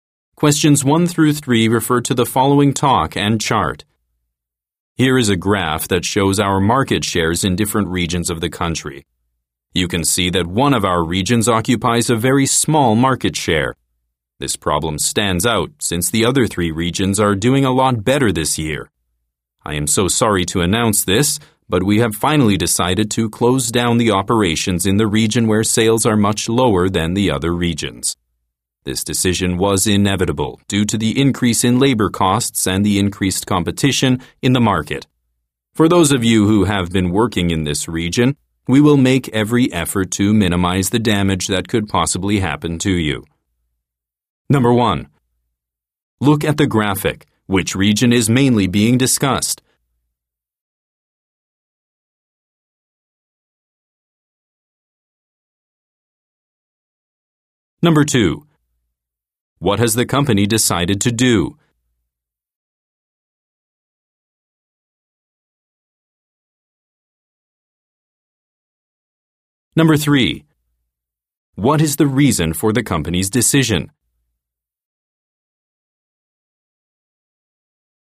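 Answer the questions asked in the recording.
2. Close down operations in the region with low sales
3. Increased labor costs and more competition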